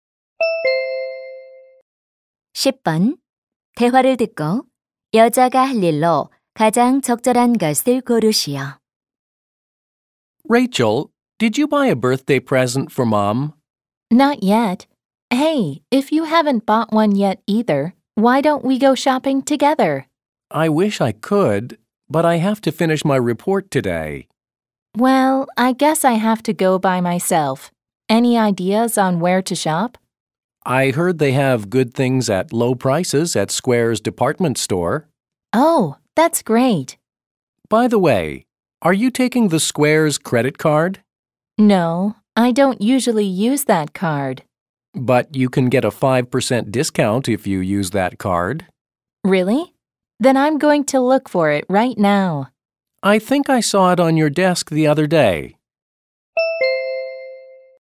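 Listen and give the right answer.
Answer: 신용카드 찾기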